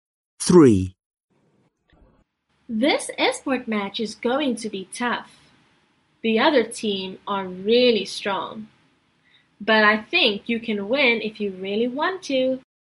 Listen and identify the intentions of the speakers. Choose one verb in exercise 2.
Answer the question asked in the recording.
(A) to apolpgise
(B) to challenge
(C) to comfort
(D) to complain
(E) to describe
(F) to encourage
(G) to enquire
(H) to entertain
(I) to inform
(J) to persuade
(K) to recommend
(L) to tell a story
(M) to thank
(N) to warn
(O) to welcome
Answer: (F) to encourage

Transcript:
3. This Edward match is going to be tough. The other team are really strong. But I think you can win if you really want to.

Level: Lớp 10